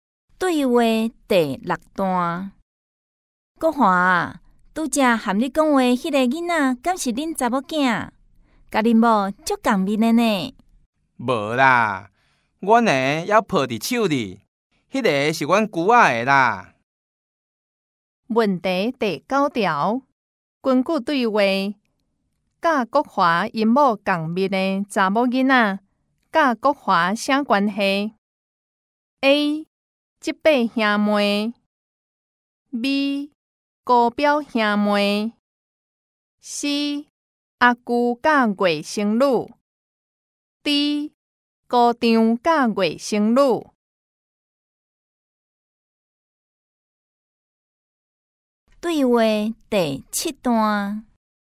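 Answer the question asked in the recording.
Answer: B: 高表兄妹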